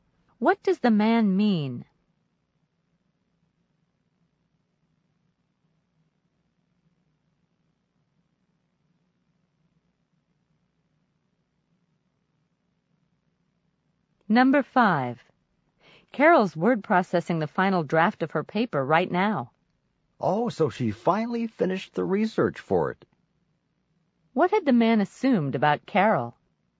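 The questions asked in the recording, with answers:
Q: What had the man assumed about Carol?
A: That she hadn't finished her research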